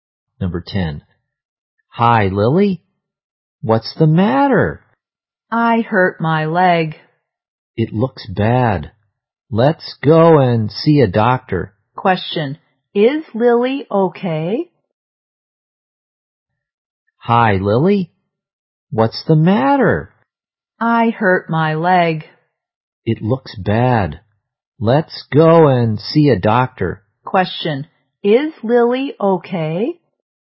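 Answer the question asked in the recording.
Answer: No, she hurt her leg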